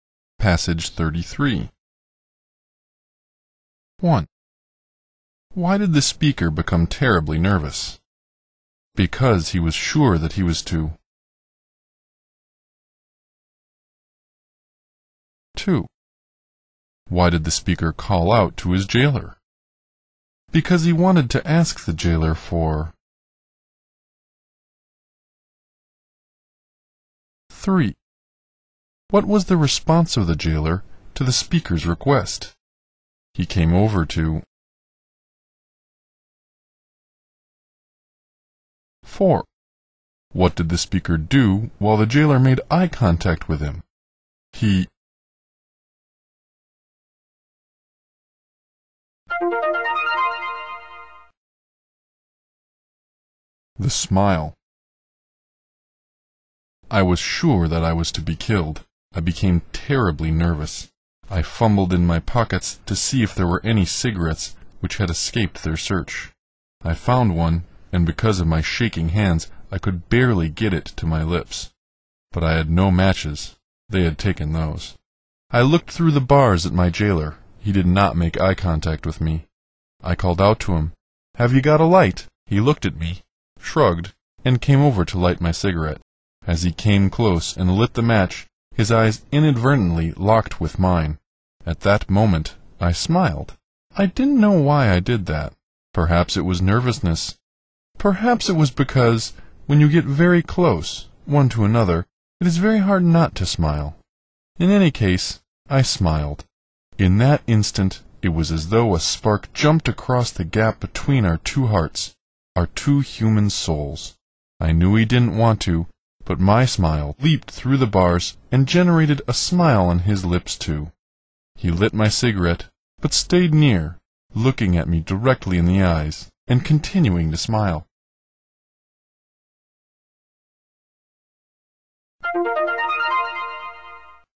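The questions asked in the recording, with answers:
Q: Why did the speaker become terribly nervous?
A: Because he was sure that he was to be killed.

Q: Why did the speaker call out to his jailer?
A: Because he wanted to ask the jailer for a light.

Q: What was the response of the jailer to the speaker's request?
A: He came over to light his cigarette.

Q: What did the speaker do while the jailer made eye contact with him?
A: He smiled.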